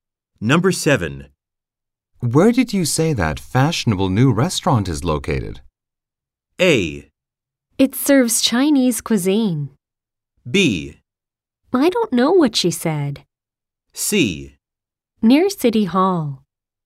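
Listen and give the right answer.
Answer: C: Near City Hall.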